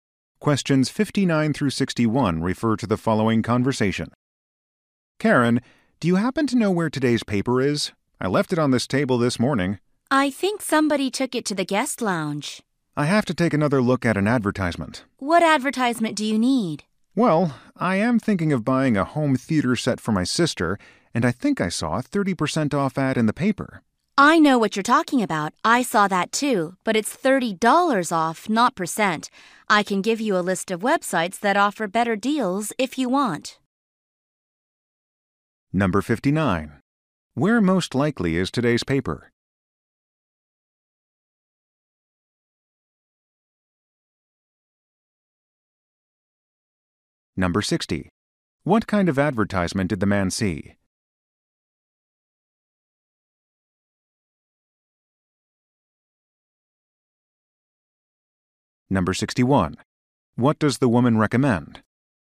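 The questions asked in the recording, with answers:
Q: Where most likely is today's paper?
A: In the guest lounge

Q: What kind of advertisement did the man see?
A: A discount on a home theater set

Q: What does the woman recommend?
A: Checking websites with better deals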